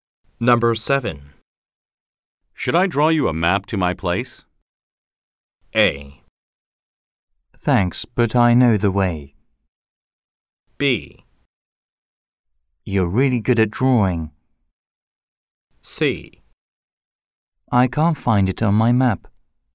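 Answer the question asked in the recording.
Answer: A: Thanks, but I know the way.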